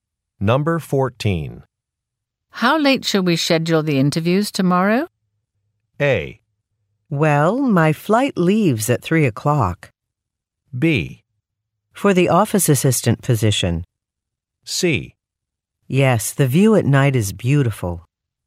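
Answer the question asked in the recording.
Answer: A: Well, my flight leaves at 3 o'clock.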